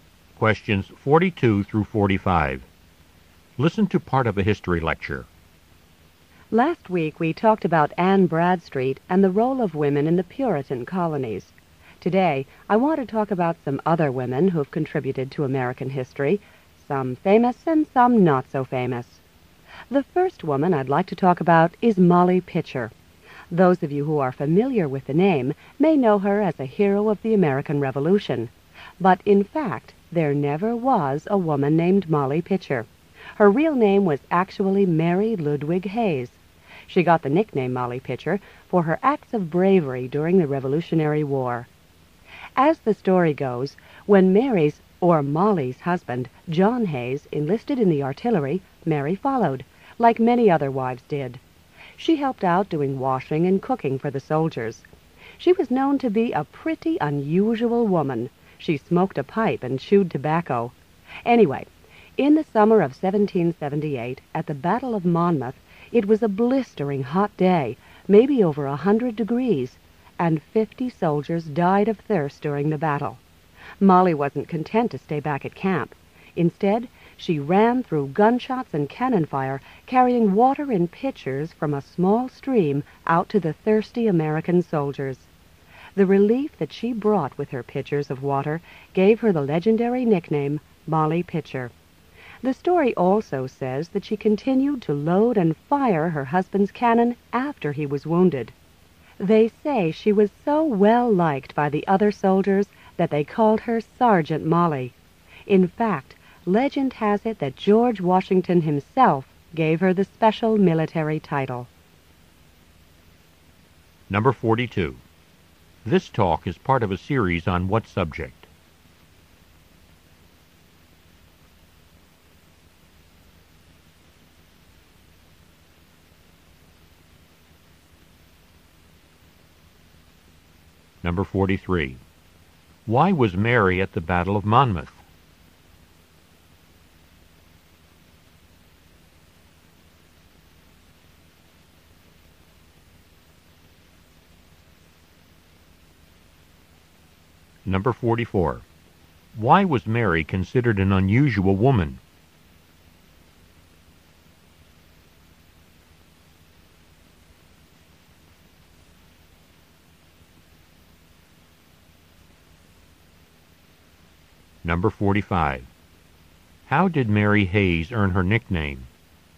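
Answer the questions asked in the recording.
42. Women who contributed to American history
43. She followed her husband, who enlisted in the artillery
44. She smoked a pipe and chewed tobacco
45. By carrying pitchers of water to thirsty soldiers during the battle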